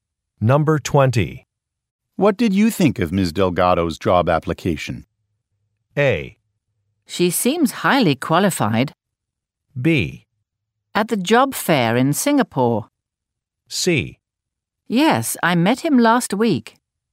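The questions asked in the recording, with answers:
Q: What did you think of Ms. Delgado's job application?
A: A: She seems highly qualified.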